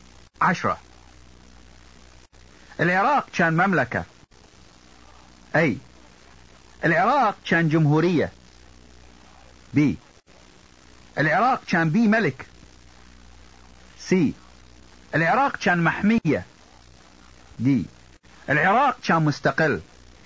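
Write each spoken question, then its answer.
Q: العراق كان مملكة.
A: B: العراق كان بي ملك.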